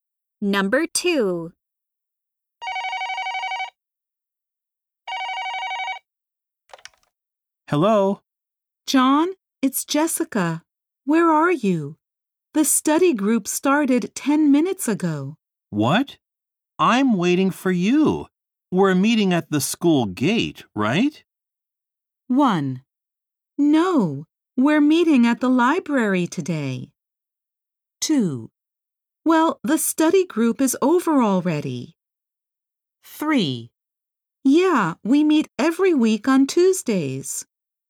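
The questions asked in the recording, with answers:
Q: What?I'm waiting for you. We're meeting at the school gate, right?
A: 1: No, we're meeting at the library today.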